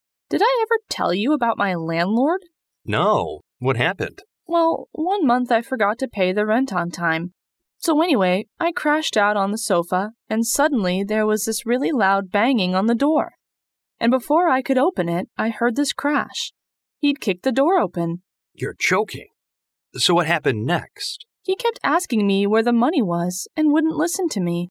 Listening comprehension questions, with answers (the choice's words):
What did the woman's landlord do?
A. He kept knocking on the woman's door.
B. He kicked the woman's door open.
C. He asked for the rent by threatening letter.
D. He kicked the woman out.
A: He kicked the woman's door open.

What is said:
W: Did I ever tell you about my landlord?
M: No, what happened?
W: Well, one month I forgot to pay the rent on time. So anyway, I crashed out on the sofa, and suddenly there was this really loud banging on the door. And before I could open it I heard this crash. He'd kicked the door open.
M: You're joking. So what happened next?
W: He kept asking me where the money was and wouldn't listen to me.